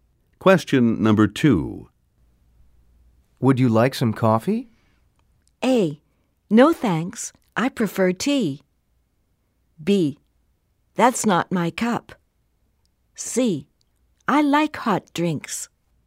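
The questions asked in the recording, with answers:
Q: Would you like some coffee?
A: A: No thanks, I prefer tea.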